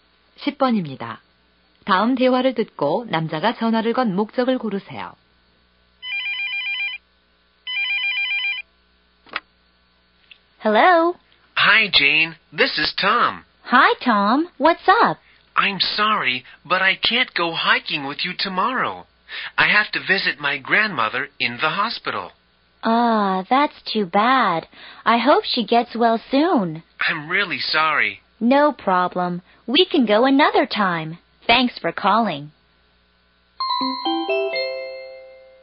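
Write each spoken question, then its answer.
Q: 다음 대화를 듣고 남자가 전화를 건 목적을 고르세요.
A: 내일 하이킹 약속을 취소하려고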